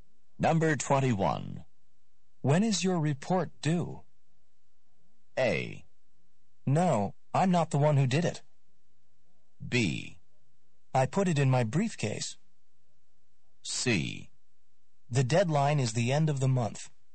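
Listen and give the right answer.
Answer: C: The deadline is the end of the month.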